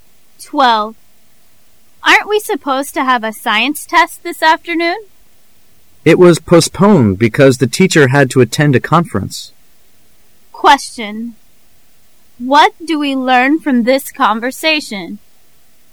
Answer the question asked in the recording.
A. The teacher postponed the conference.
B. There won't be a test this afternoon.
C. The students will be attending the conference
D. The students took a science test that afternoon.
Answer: B. There won't be a test this afternoon.

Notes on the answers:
W: Aren't we supposed to have a science test this afternoon? M: It was postponed because the teacher had to attend a conference. Q: What do we learn from this conversation? [试题分析]本题考查对文中内容的理解和辨识。 [关键词语]postponed,attend a conference. [详细解答]the man回答说考试延期了,因为老师不得不去参加一个会议。并不是说老师把会议延期了。因而答案为B。

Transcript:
[解析] W: Aren't we supposed to have a science test this afternoon? M: It was postponed because the teacher had to attend a conference. Q: What do we learn from this conversation?